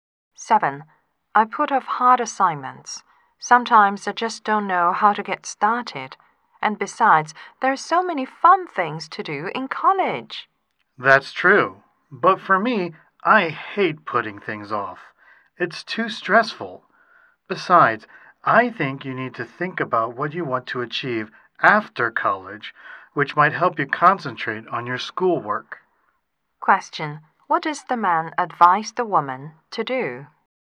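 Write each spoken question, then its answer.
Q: What does the man advise the woman to do?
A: Think about what she wants to achieve after college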